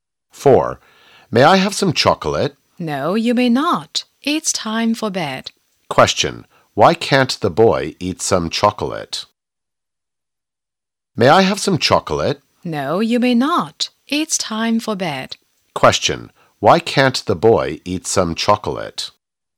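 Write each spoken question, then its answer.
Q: Why can't the boy eat some chocolate?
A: Because it's time for bed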